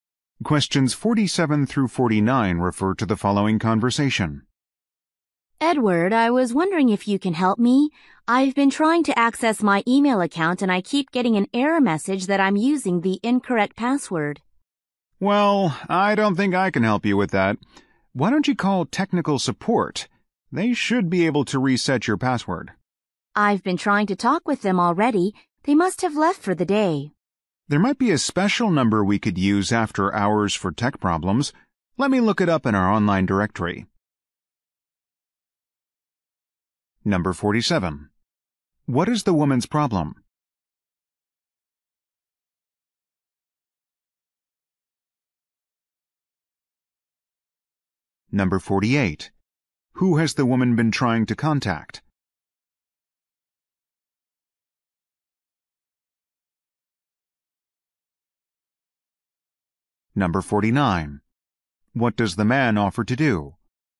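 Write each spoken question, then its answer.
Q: What is the woman's problem?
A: She can't access her email account

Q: Who has the woman been trying to contact?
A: Technical support

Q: What does the man offer to do?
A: Look up an after-hours number in the online directory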